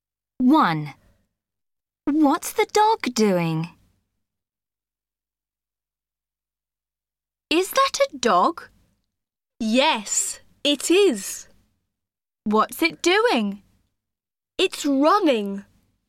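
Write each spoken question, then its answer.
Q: What's the dog doing?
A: It's running.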